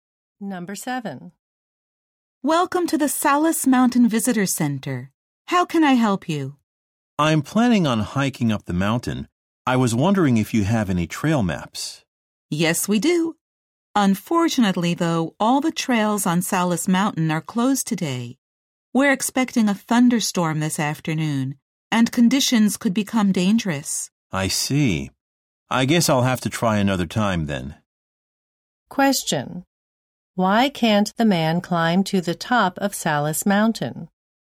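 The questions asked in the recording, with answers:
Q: Why can't the man climb to the top of Salus Mountain?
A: The trails are closed because a thunderstorm is expected.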